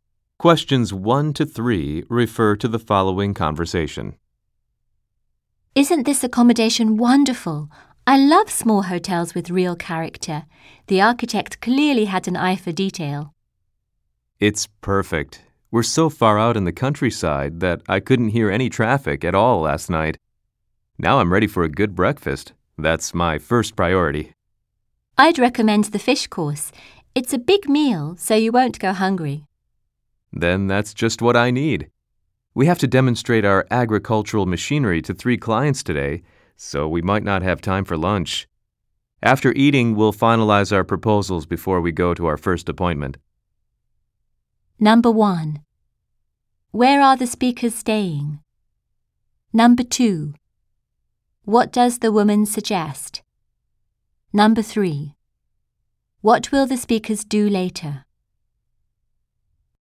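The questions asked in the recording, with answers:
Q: Where are the speakers staying?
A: At a small hotel in the countryside

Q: What does the woman suggest?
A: Having the fish course for breakfast

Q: What will the speakers do later?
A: Finalize their proposals, then demonstrate agricultural machinery to clients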